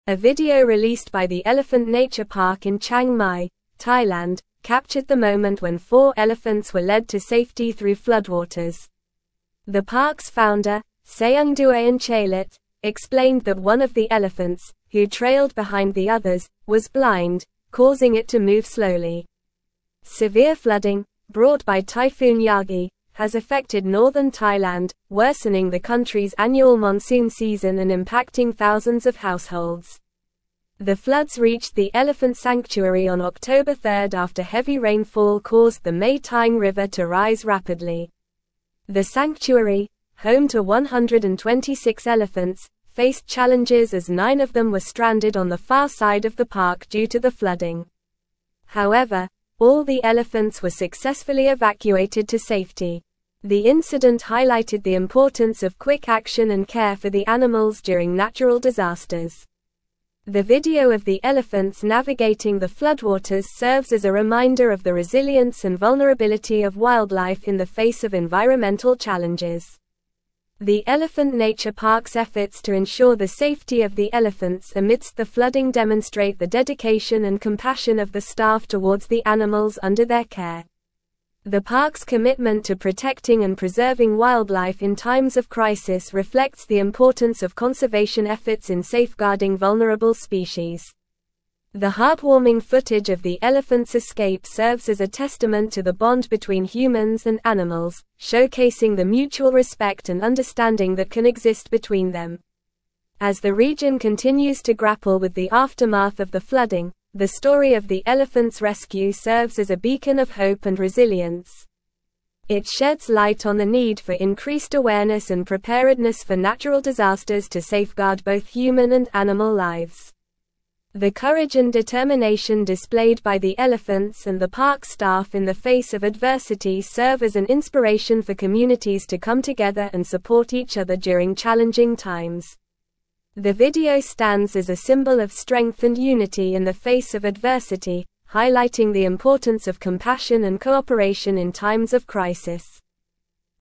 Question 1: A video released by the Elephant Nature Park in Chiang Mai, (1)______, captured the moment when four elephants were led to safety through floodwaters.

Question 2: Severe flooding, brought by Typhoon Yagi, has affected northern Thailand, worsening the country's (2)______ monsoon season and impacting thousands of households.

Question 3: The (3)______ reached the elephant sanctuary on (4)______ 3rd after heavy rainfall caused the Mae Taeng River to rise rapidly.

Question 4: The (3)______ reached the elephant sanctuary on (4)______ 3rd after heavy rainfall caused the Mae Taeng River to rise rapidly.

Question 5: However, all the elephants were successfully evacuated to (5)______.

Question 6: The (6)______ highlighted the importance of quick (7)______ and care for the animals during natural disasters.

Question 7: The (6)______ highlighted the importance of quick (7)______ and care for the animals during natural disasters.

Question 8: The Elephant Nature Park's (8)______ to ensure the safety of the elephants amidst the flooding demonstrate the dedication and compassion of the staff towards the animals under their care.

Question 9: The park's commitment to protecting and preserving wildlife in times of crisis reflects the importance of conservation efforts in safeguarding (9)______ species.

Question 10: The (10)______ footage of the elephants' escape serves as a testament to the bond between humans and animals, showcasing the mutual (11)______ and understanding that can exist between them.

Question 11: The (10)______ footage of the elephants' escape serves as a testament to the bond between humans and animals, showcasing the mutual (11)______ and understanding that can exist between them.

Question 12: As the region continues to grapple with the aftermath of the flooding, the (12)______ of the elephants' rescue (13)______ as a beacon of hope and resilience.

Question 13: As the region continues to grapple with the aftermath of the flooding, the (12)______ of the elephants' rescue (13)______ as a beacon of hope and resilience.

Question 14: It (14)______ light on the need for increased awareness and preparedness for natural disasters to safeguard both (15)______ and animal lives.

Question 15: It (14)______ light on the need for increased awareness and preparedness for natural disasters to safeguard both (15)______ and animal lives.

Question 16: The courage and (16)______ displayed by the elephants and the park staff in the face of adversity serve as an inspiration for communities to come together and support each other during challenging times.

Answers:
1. Thailand
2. annual
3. floods
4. October
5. safety
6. incident
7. action
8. efforts
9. vulnerable
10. heartwarming
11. respect
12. story
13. serves
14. sheds
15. human
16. determination

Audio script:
A video released by the Elephant Nature Park in Chiang Mai, Thailand, captured the moment when four elephants were led to safety through floodwaters. The park's founder, Saengduean Chailert, explained that one of the elephants, who trailed behind the others, was blind, causing it to move slowly. Severe flooding, brought by Typhoon Yagi, has affected northern Thailand, worsening the country's annual monsoon season and impacting thousands of households. The floods reached the elephant sanctuary on October 3rd after heavy rainfall caused the Mae Taeng River to rise rapidly.
The sanctuary, home to 126 elephants, faced challenges as nine of them were stranded on the far side of the park due to the flooding. However, all the elephants were successfully evacuated to safety. The incident highlighted the importance of quick action and care for the animals during natural disasters. The video of the elephants navigating the floodwaters serves as a reminder of the resilience and vulnerability of wildlife in the face of environmental challenges.
The Elephant Nature Park's efforts to ensure the safety of the elephants amidst the flooding demonstrate the dedication and compassion of the staff towards the animals under their care. The park's commitment to protecting and preserving wildlife in times of crisis reflects the importance of conservation efforts in safeguarding vulnerable species. The heartwarming footage of the elephants' escape serves as a testament to the bond between humans and animals, showcasing the mutual respect and understanding that can exist between them.
As the region continues to grapple with the aftermath of the flooding, the story of the elephants' rescue serves as a beacon of hope and resilience. It sheds light on the need for increased awareness and preparedness for natural disasters to safeguard both human and animal lives. The courage and determination displayed by the elephants and the park staff in the face of adversity serve as an inspiration for communities to come together and support each other during challenging times. The video stands as a symbol of strength and unity in the face of adversity, highlighting the importance of compassion and cooperation in times of crisis.

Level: Level 4